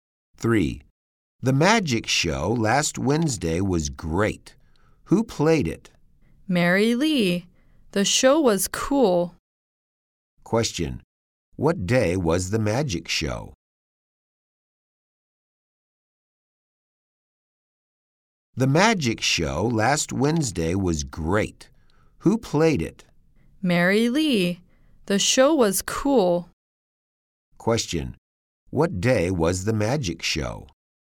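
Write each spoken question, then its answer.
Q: What day was the magic show?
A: Last Wednesday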